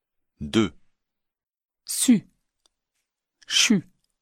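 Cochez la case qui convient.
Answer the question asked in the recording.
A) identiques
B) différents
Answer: B) différents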